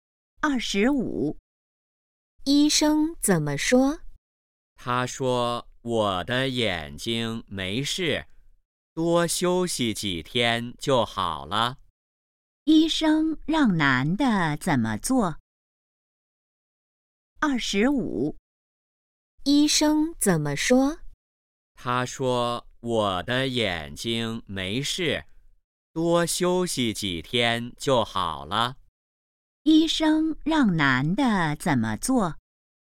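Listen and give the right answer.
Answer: 多休息几天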